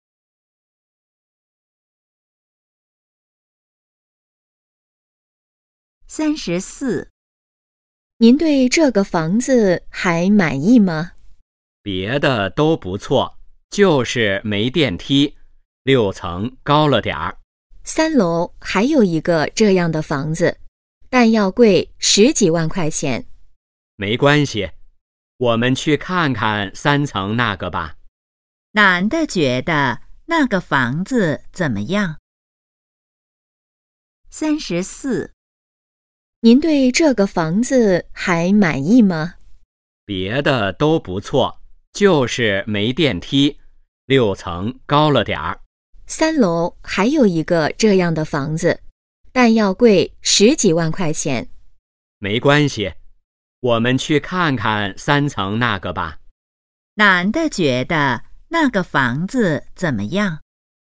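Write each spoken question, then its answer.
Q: 男的觉得那个房子怎么样?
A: 没电梯,六层太高了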